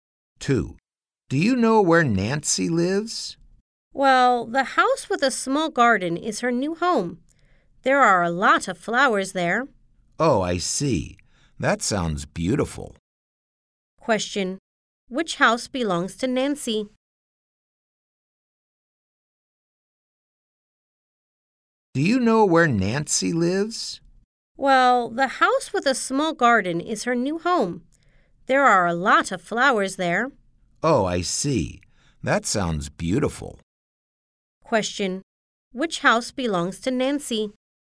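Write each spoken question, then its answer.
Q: Which house belongs to Nancy?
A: The house with a small garden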